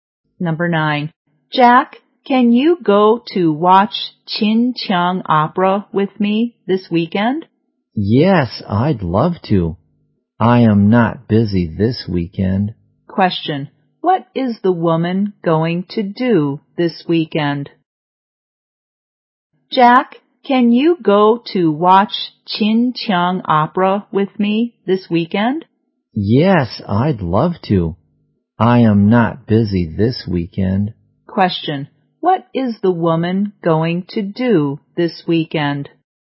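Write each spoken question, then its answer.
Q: Question. What is the woman going to do this weekend?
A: Watch Qin Qiang Opera with Jack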